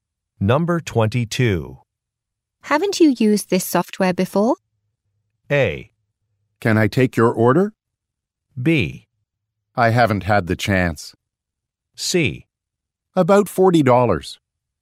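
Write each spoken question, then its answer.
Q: Haven't you used this software before?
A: B: I haven't had the chance.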